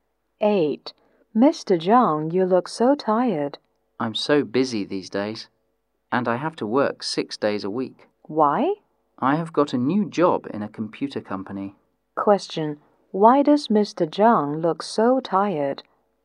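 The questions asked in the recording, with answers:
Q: Why does Mr. Zhang look so tired?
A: He has a new job at a computer company and works 6 days a week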